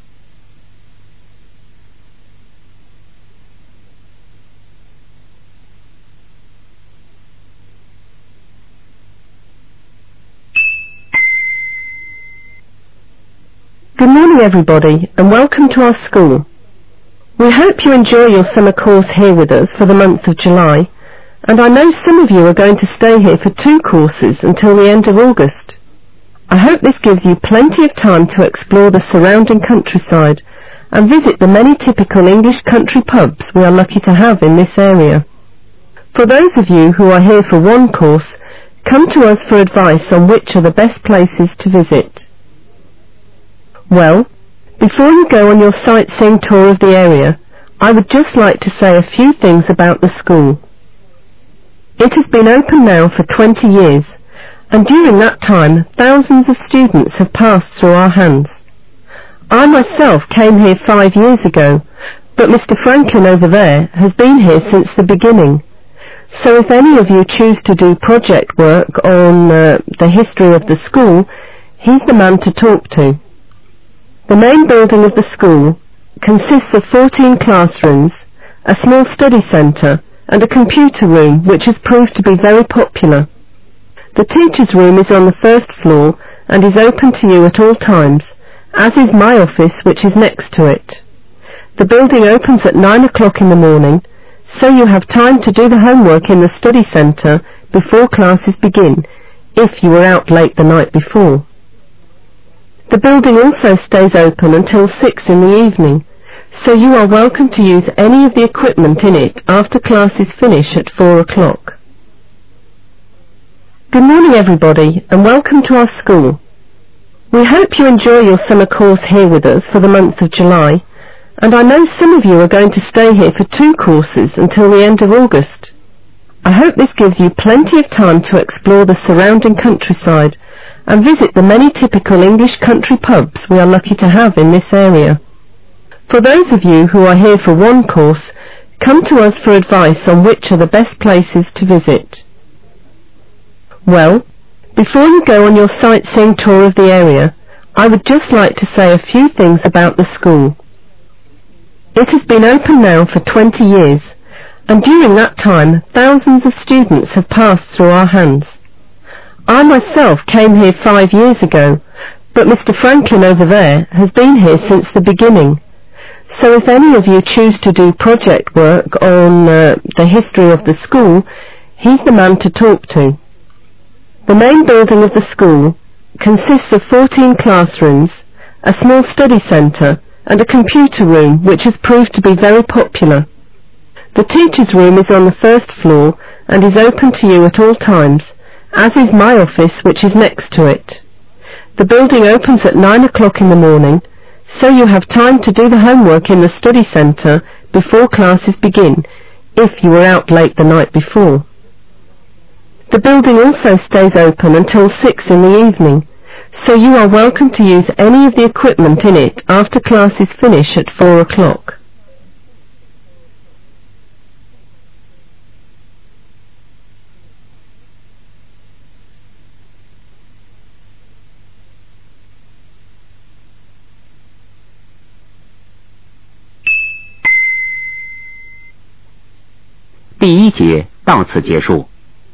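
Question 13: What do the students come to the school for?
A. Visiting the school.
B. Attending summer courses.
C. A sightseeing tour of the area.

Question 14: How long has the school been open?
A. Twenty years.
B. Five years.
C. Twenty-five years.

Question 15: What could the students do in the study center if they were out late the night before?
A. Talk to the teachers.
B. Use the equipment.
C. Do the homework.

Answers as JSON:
{"13": "B", "14": "A", "15": "C"}

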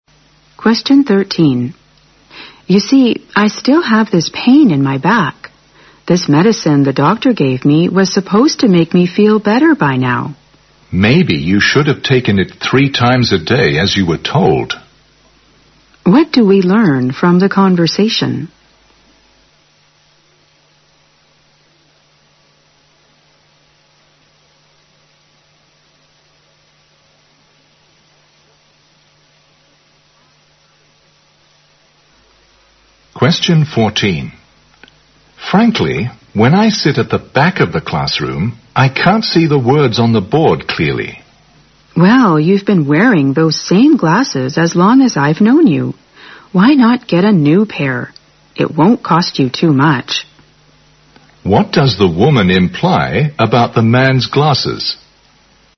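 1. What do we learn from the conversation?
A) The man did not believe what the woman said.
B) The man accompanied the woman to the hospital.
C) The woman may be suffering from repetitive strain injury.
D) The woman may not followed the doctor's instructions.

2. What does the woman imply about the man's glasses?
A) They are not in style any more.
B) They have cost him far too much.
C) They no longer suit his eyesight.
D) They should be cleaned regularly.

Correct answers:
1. D
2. C

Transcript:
W: You see, I still have this pain in my back, this medicine the doctor gave me was supposed to make me feel better by now.
M: Maybe you should take 3 times a day as you were told.
Q: What do we learn from the conversation?
M: Frankly, when I sat the back of the classroom, I can't see the words on the board clearly.
W: Well, you've been wearing those same glasses as long as I've known you. Why not get a new pair? 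It wouldn't cost you too much.
Q: What does the woman imply about the man's glasses?

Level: 六级

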